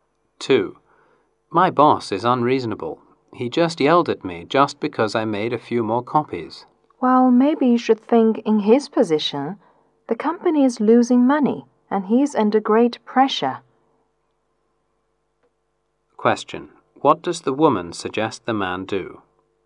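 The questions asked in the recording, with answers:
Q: What does the woman suggest the man do?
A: Think from his boss's position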